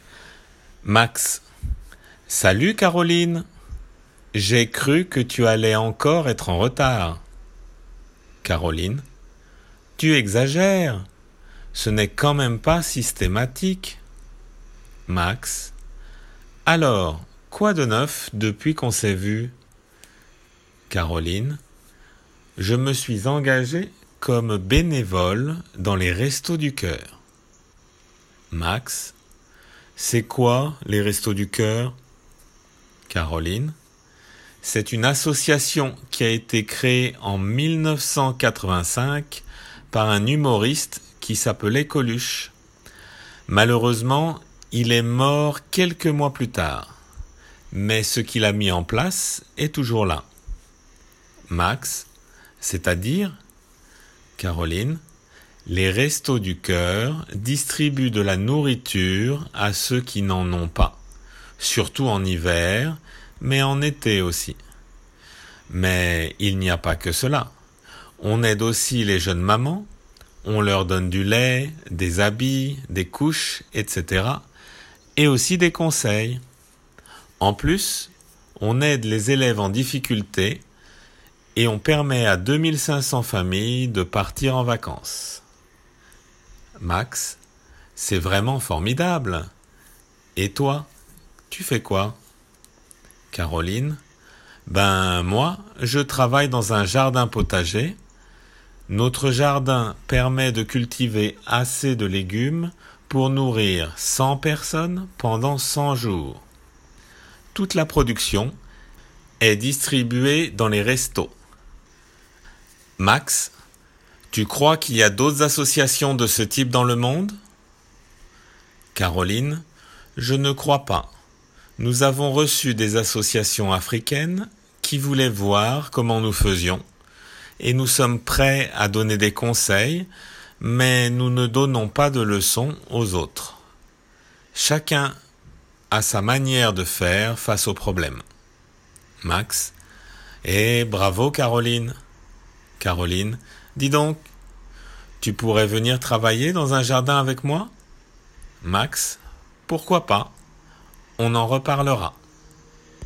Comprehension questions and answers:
空欄を埋めましょう。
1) Lorsque Caroline arrive , Max montre son ( ).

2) Caroline donne de son temp à une ( ).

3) C'est une association qui a été créée en ( ).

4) Qui a créé les Restos du Cœur ? Un ( ) qui ( ) Coluche.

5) 2 actions parmi cells-ci : distribuer de la ( ), aider les( ) mamans.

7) De ( ) avec ( ) dans un ( ) des Restos du Cœur .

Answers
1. impatience
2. assotiation
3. 1985
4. humoriste s'appelait
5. nourriture jeunes
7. travailler elle jardins

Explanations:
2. ( bénévole は無冠詞名詞なので cetteに一致させて associationで表現 ) ( donner à ~ , engager comme bénévole の用法の違いに注意 )
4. ( s'appele でなく infinitive で表現 )un humoriste ( リエゾンの為に ニュー の音に気をつけて。)
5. (読まれるテキストでは pour nourrir と表現されているが、 nourriture と名詞で表現する。)

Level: Delf B1